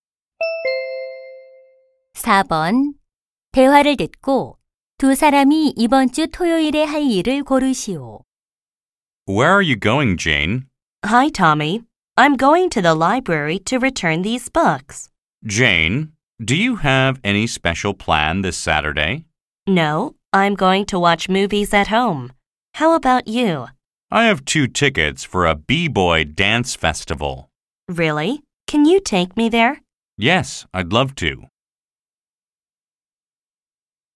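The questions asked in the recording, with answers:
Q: 대화를 듣고 두 사람이 이번 주 토요일에 할 일을 고르시오.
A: 비보이 댄스 페스티벌 관람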